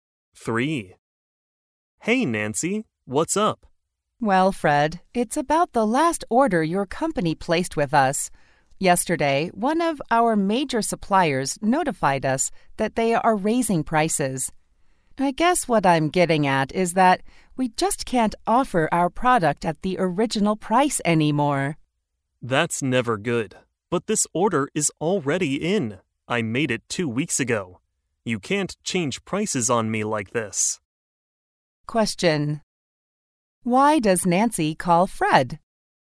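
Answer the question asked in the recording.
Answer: To tell him she can no longer sell the product at the original price because a supplier raised its prices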